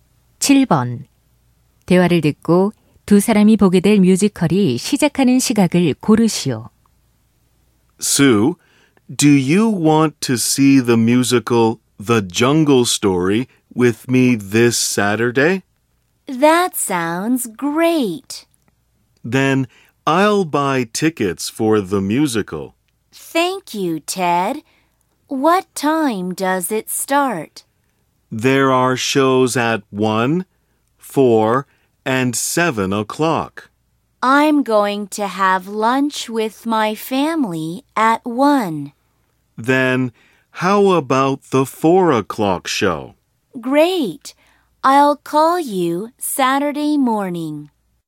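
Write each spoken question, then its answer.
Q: 대화를 듣고 두 사람이 보게 될 뮤지컬이 시작하는 시각을 고르시오.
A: 4시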